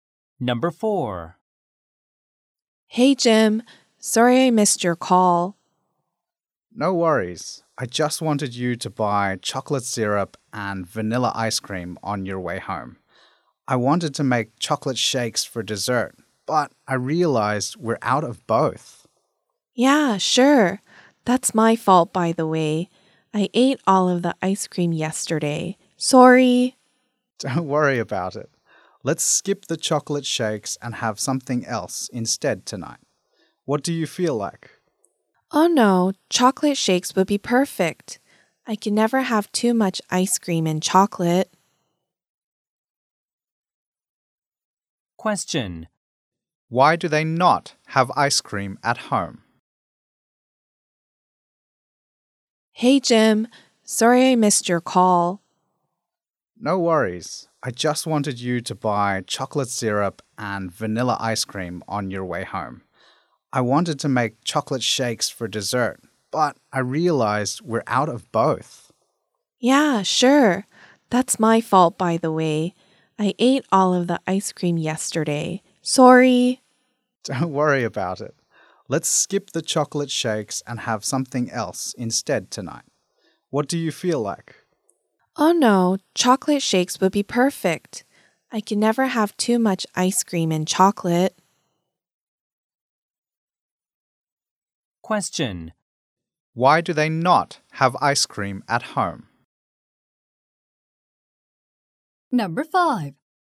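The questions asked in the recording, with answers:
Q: Why do they not have ice cream at home?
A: Because Jim's partner ate all of it yesterday.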